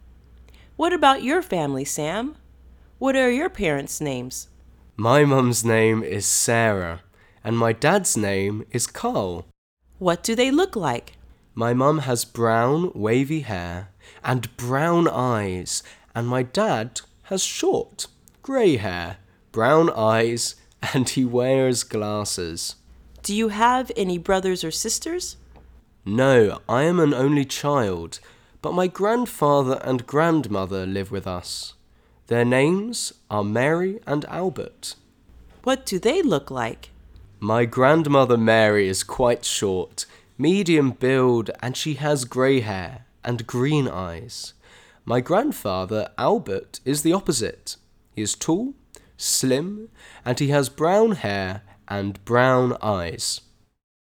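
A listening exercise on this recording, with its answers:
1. Which sentence about Sam is true? Listen and choose the correct sentence.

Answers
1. Sam is an only child and his grandparents live with his family.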